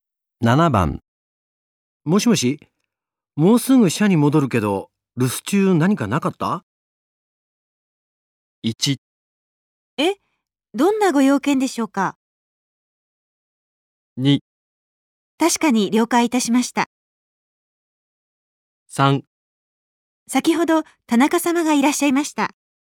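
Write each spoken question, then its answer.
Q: もしもし、もうすぐ社に戻るけど、留守中何かなかった?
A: 3: 先ほど田中様がいらっしゃいました。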